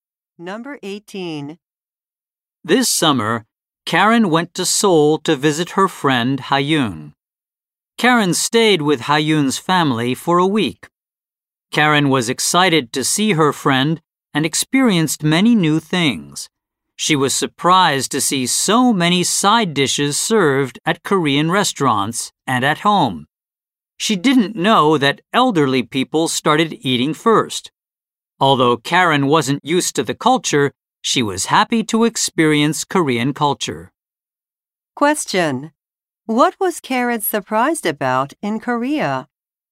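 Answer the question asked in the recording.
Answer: The many side dishes served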